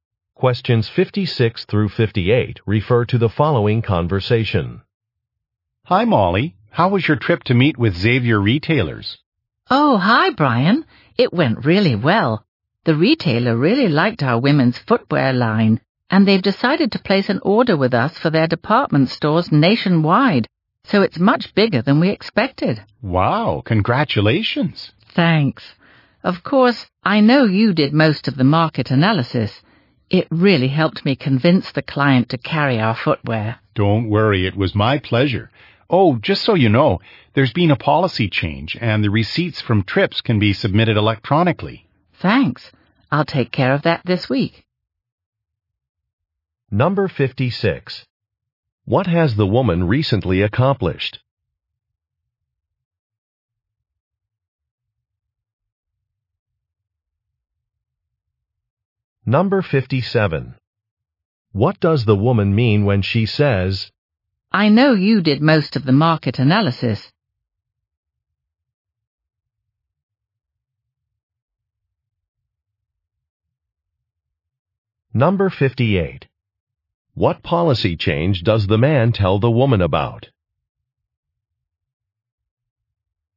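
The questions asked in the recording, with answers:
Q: What has the woman recently accomplished?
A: Got a large order from a retailer

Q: What does the woman mean when she says,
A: She is thanking the man for his help

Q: What policy change does the man tell the woman about?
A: Trip receipts can be submitted electronically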